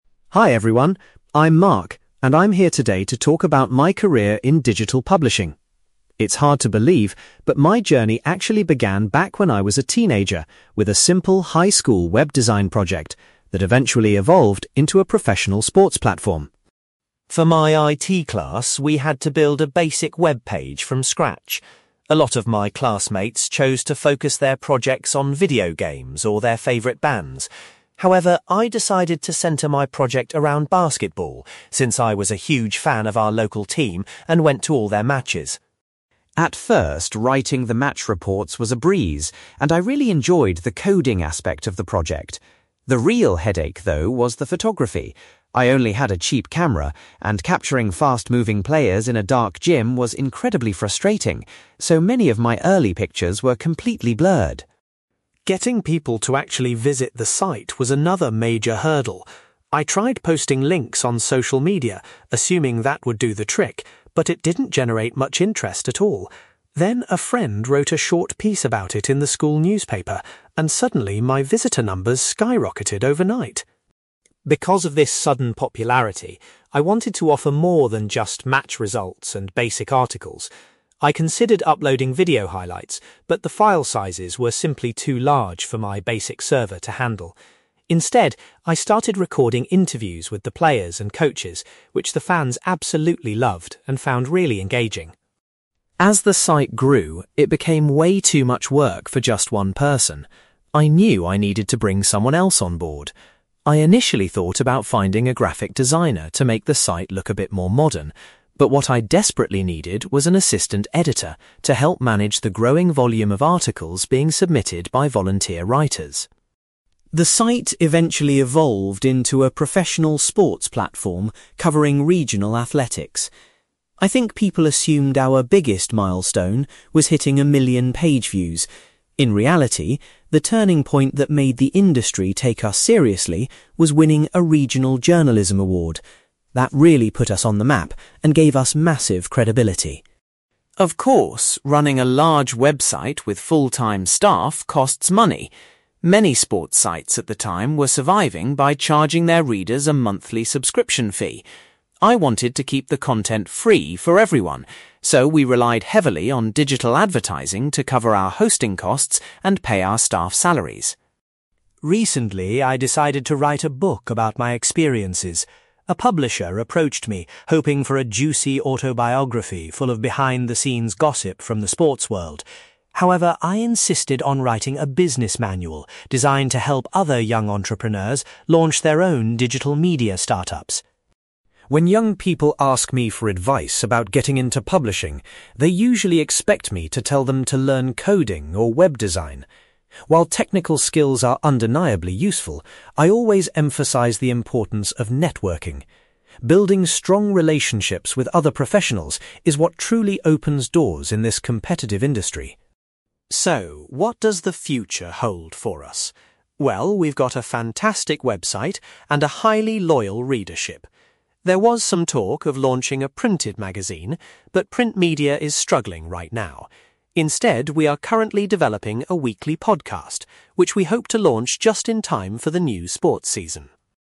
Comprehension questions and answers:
You will hear a man called Mark giving a talk about how he started a professional sports website. For questions 9-18, complete the sentences with a word or short phrase.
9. Mark chose to focus his initial web design project on the subject of (9)........................... .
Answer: basketball

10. Mark found that the (10)........................... was the most difficult part of running his early website.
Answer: photography

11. Mark's website became popular after it was mentioned in the (11)........................... .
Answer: school newspaper

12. Mark expanded his website's content by including (12)........................... with people involved in the sport.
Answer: interviews

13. The first person Mark hired to help him with the website was an (13)........................... .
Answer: assistant editor

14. Mark believes that winning a (14)........................... was the moment the industry began to take his website seriously.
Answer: journalism award

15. Mark's website was funded primarily through (15)........................... rather than charging users.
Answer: digital advertising

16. Mark describes the book he has recently written as a (16)........................... for young entrepreneurs.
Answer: business manual

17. Mark says that (17)........................... is the most important skill for a successful career in media.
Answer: networking

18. Mark's next project is to launch a (18)........................... before the new season starts.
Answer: podcast

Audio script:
Mark: Hi everyone! I'm Mark, and I'm here today to talk about my career in digital publishing. It's hard to believe, but my journey actually began back when I was a teenager with a simple high school web design project that eventually evolved into a professional sports platform.
For my IT class, we had to build a basic webpage from scratch. A lot of my classmates chose to focus their projects on video games or their favourite bands. However, I decided to centre my project around basketball, since I was a huge fan of our local team and went to all their matches.
At first, writing the match reports was a breeze, and I really enjoyed the coding aspect of the project. The real headache, though, was the photography. I only had a cheap camera, and capturing fast-moving players in a dark gym was incredibly frustrating, so many of my early pictures were completely blurred!
Getting people to actually visit the site was another major hurdle. I tried posting links on social media, assuming that would do the trick, but it didn't generate much interest at all. Then, a friend wrote a short piece about it in the school newspaper, and suddenly, my visitor numbers skyrocketed overnight.
Because of this sudden popularity, I wanted to offer more than just match results and basic articles. I considered uploading video highlights, but the file sizes were simply too large for my basic server to handle. Instead, I started recording interviews with the players and coaches, which the fans absolutely loved and found really engaging.
As the site grew, it became way too much work for just one person. I knew I needed to bring someone else on board. I initially thought about finding a graphic designer to make the site look a bit more modern. But what I desperately needed was an assistant editor to help manage the growing volume of articles being submitted by volunteer writers.
I think people assumed our biggest milestone was hitting a million page views. In reality, the turning point that made the industry take us seriously was winning a regional journalism award. That really put us on the map and gave us massive credibility.
Of course, running a large website with full-time staff costs money. Many sports sites at the time were surviving by charging their readers a monthly subscription fee. I wanted to keep the content free for everyone, so we relied heavily on digital advertising to cover our hosting costs and pay our staff salaries.
Recently, I decided to write a book about my experiences. A publisher approached me hoping for a juicy autobiography full of behind-the-scenes gossip from the sports world. However, I insisted on writing a business manual designed to help other young entrepreneurs launch their own digital media startups.
When young people ask me for advice about getting into publishing, they usually expect me to tell them to learn coding or web design. While technical skills are undeniably useful, I always emphasize the importance of networking. Building strong relationships with other professionals is what truly opens doors in this competitive industry.
So, what does the future hold for us? Well, we've got a fantastic website and a highly loyal readership. There was some talk of launching a printed magazine, but print media is struggling right now. Instead, we are currently developing a weekly podcast, which we hope to launch just in time for the new sports season.

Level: B2